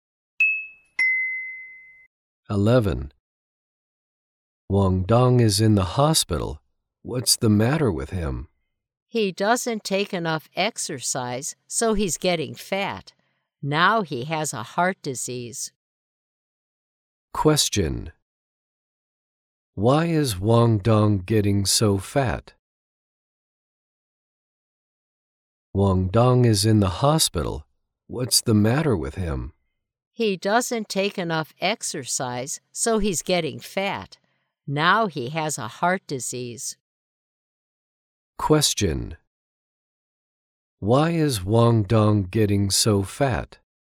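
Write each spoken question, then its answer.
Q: Why is Wang Dong getting so fat?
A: Because he doesn't take enough exercise.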